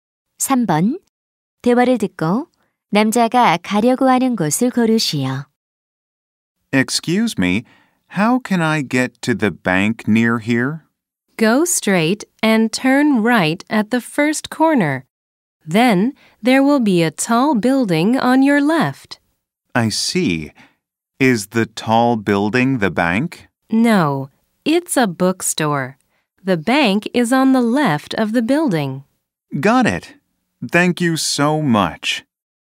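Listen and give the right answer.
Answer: 은행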